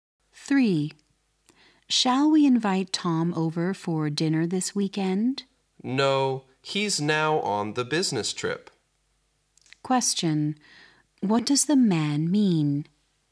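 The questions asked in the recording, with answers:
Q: What does the man mean?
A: Tom can't come because he's on a business trip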